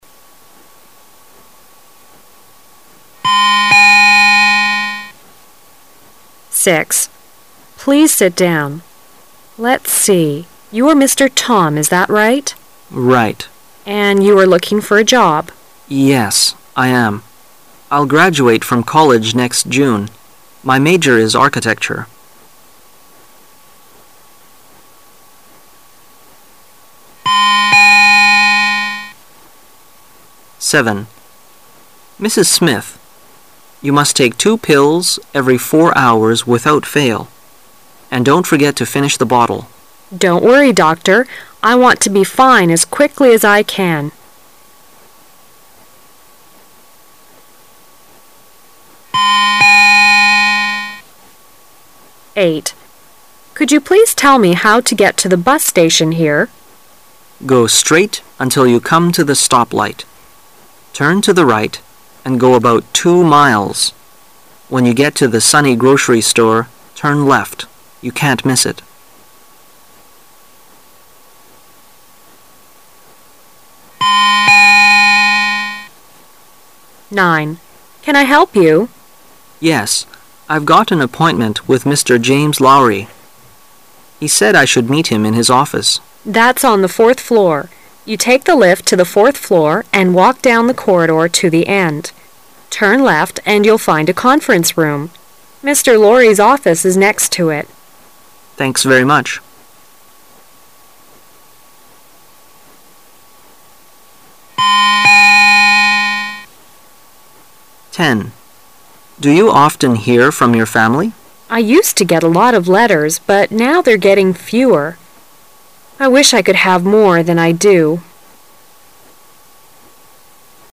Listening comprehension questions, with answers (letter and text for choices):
Part A You will hear 10 short dialogues. For each dialogue, there is one question and four possible answers. Choose the correct answer- A, B, C or D, and mark it in your test booklet. You will have 15 seconds to answer the question and you will hear each dialogue ONLY ONCE.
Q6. What probably is the relationship between the two speakers?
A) Teacher and student.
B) Manager and customer.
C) Secretary and client.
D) Interviewer and interviewee.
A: D) Interviewer and interviewee.

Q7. What will the woman probably do?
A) Take four pills.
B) Hesitate to take any pills.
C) Take the doctor's advice.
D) Take eight pills.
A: C) Take the doctor's advice.

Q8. What is the woman trying to do?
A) Get directions to the bus station.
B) Get to the grocery store.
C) Give the man directions to the bus station.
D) Find out where the stoplight is.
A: A) Get directions to the bus station.

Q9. What does the man want to know?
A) The way to the fifth floor.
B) The way to Mr. Laury's office.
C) The way to the conference room.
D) The way to the lift.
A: B) The way to Mr. Laury's office.

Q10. What do we learn from the woman's words?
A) She has more letters now than before.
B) She hasn't so many letters as before.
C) She often hears from her family now.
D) She is used to having a lot of letters.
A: B) She hasn't so many letters as before.

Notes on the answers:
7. M: Mrs. Smith, you must take two pills every four hours without fail. And don't forget to finish the bottle. W: Don't worry, Doctor. I want to be free as quickly as I can.
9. W: Can I help you? M: Yes. I've got an appointment with Mr. James Laury. He said I should meet him in his office. W: That's on the fourth floor. You take the lift to the fourth floor and walk down the corridor to the end. Turn left and you'll find a conference room. Mr. Laury's office is next to it. M: Thanks very much.